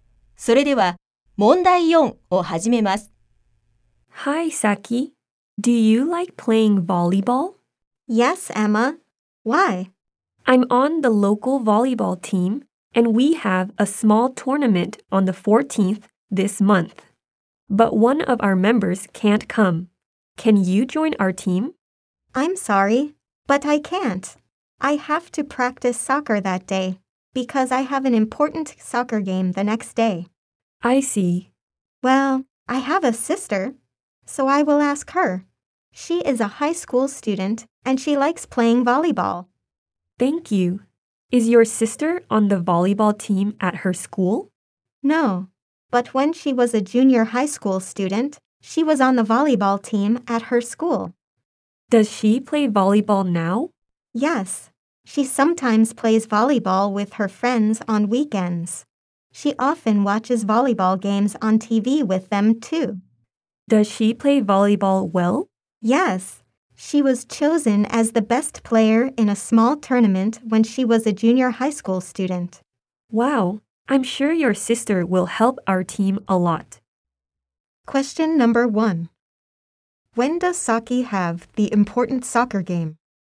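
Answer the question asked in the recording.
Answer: On the 15th of this month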